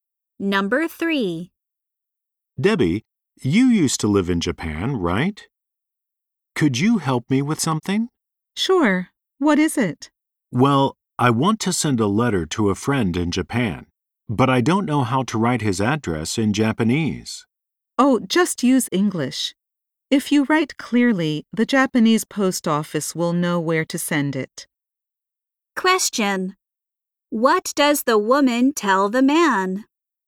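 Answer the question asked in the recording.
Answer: He can write the address clearly in English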